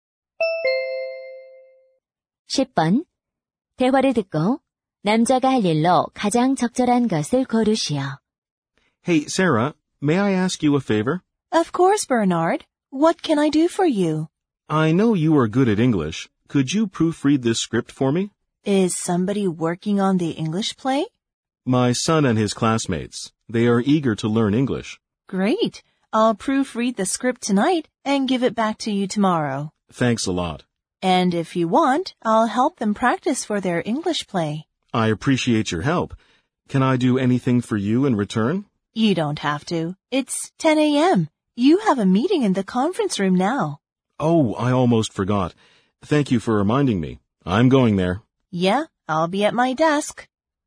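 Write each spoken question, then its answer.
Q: 대화를 듣고 남자가 할 일로 가장 적절한 것을 고르시오.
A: 회의실에서 열리는 회의에 참석하기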